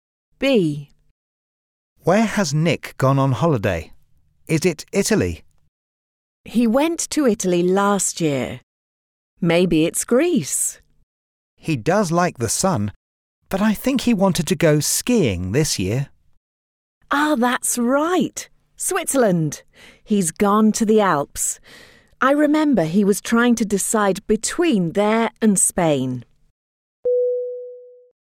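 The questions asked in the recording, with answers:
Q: Where has Nick gone on holiday?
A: Switzerland (the Alps)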